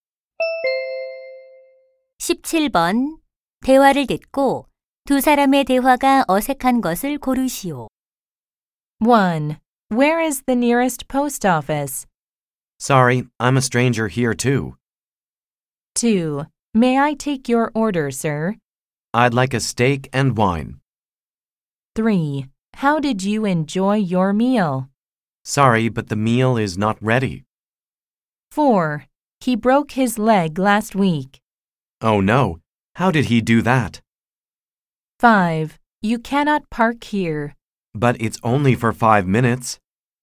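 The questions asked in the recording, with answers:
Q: 대화를 듣고 두 사람의 대화가 어색한 것을 고르시오.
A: 3: How did you enjoy your meal? / Sorry, but the meal is not ready.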